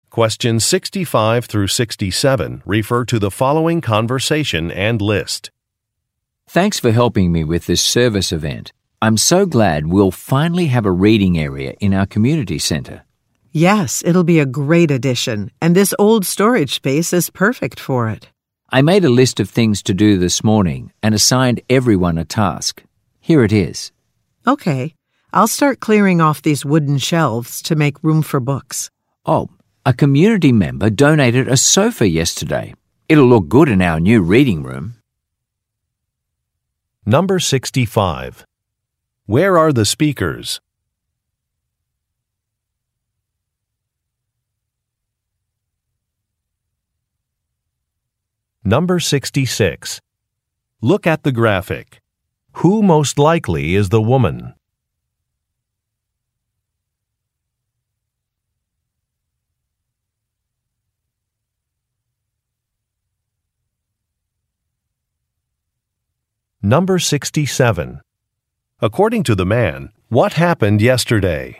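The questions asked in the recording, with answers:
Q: Where are the speakers?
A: At a community center

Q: According to the man, what happened yesterday?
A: A community member donated a sofa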